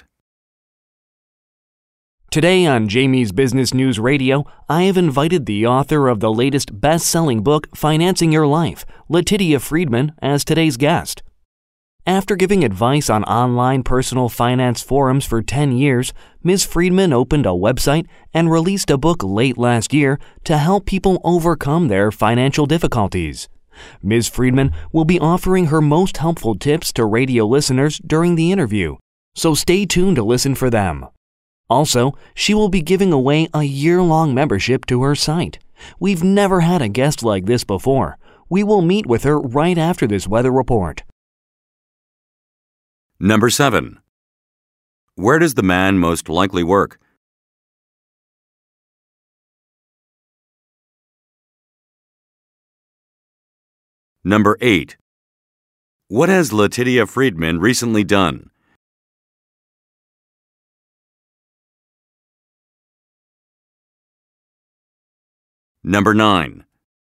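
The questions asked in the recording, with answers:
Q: Where does the man most likely work?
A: At a radio station

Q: What has Letitia Friedman recently done?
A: Released a book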